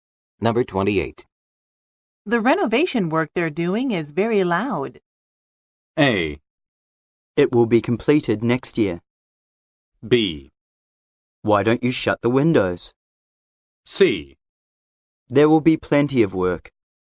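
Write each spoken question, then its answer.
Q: The renovation work they're doing is very loud.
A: B: Why don't you shut the windows?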